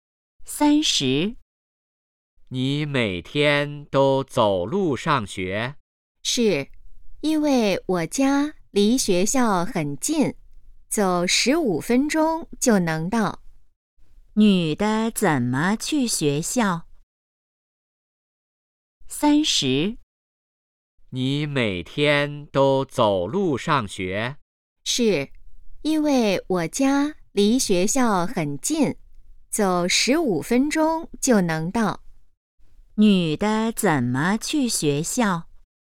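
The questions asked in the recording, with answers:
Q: 女的怎么去学校?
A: 走路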